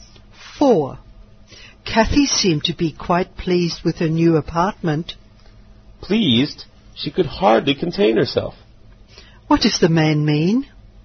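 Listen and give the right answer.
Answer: Kathy was extremely pleased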